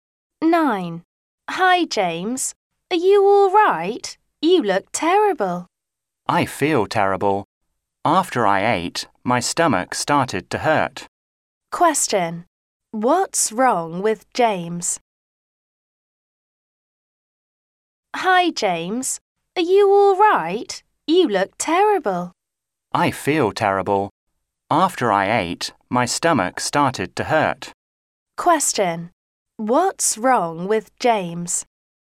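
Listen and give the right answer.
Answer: His stomach hurts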